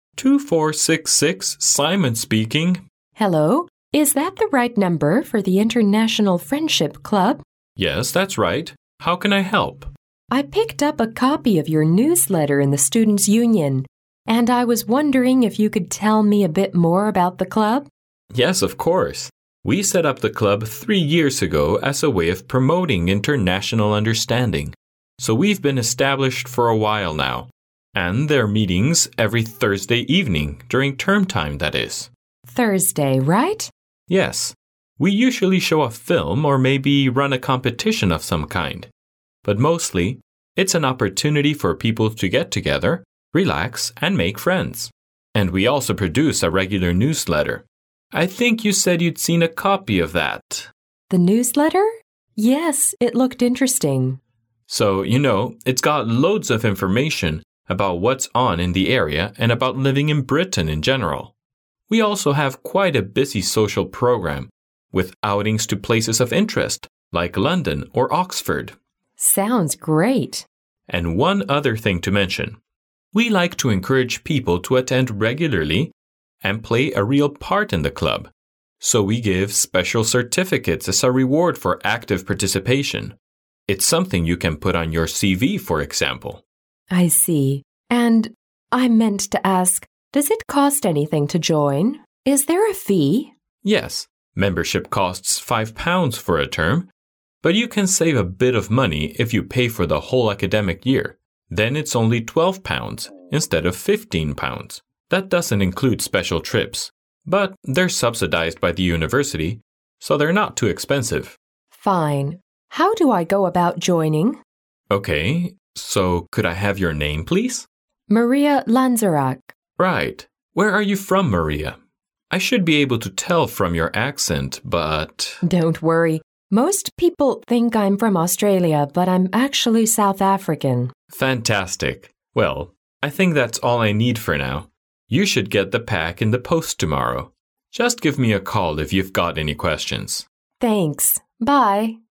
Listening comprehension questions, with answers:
Directions:Each conversation will be read only once. At the end of each conversation, there will be a one-minute pause. During the pause, read the four choices marked A, B, C and D, and decide which is the best answer or complete the following sentences with one word according to what you hear.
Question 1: The International Friendship Club was established three _____ ago.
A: years

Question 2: A club member has to pay for _____ arranged trips.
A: special

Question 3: An active participant can get a special medal as _____.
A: reward

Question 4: The membership fee is £_____ for an academic year.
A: 12

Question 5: One needs to provide _____ and address to become a club member.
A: name

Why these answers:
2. 男士为女士介绍了该社团所举办的相关活动,然后女士询问了费用问题。男士先提及了基本的会员费,但是他说special trips不算在内,由此可得知答案。
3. 男士在介绍社团活动时,谈到了"we give special certificates as a reward for active participation",即社团为了鼓励大家参与活动而设立了特别的证书(而不是奖牌)作为奖励,由此可得知答案。
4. 关于会员费,对话中涉及了两种费用,一个是每学期£5,一个是每学年£12。而男士提到£15是为了鼓励女士直接支付一个学年的费用而做的比较,并没有这一类别。
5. 对话最后,女士问加入社团需要什么信息,男士只问了其两个问题,一个是叫什么名字,一个是来自哪里。

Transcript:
M: 2466. Simon speaking.
W: Hello. Is that the right number for the International Friendship Club?
M: Yes, that's right. How can I help?
W: I picked up a copy of your newsletter in the Students' Union, and I was wondering if you could tell me a bit more about the club?
M: Yes, of course. We set up the club three years ago as a way of promoting international understanding. So we've been established for a while now. And there're meetings every Thursday evening, during term time, that is...
W: Thursday, right?
M: Yes, we usually show a film or maybe run a competition of some kind. But mostly it's an opportunity for people to get together, relax and make friends. And we also produce a regular newsletter—I think you said you'd seen a copy of that...
W: The newsletter? Yes, it looked interesting.
M: So, you know, it got loads of information about what's on in the area and about living in Britain in general. We also have quite a busy social programme with outings to places of interest like London or Oxford.
W: Sounds great.
M: And one other thing to mention. We like to encourage people to attend regularly and play a real part in the club. So we give special certificates as a reward for active participation. It's something you can put on your CV, for example.
W: I see. And I meant to ask, does it cost anything to join? Is there a fee?
M: Yes, membership costs £5 for a term but you can save a bit of money if you pay for the whole academic year. Then it's only £12, instead of £15. That doesn't include special trips. But they're subsidized by the university, so they're not too expensive.
W: Fine. How do I go about joining?
M: OK. So could I have your name, please?
M: Right. Where are you from, Maria? I should be able to tell from your accent, but...
W: Don't worry. Most people think I'm from Australia but I'm actually South African.
M: Fantastic. Well, I think that's all I need for now. You should get the pack in the post tomorrow. Just give me a call if you've got any questions.
W: Thanks. Bye.